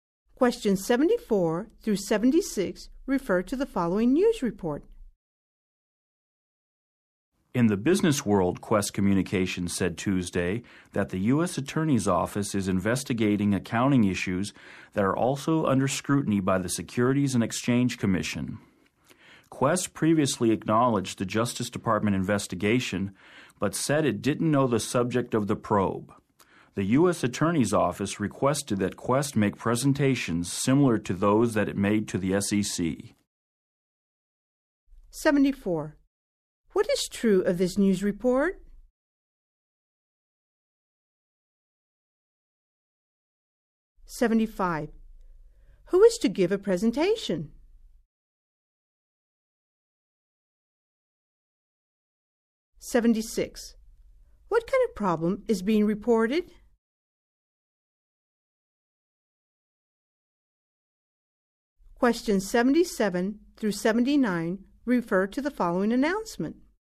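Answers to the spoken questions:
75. Quest Communications
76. Accounting issues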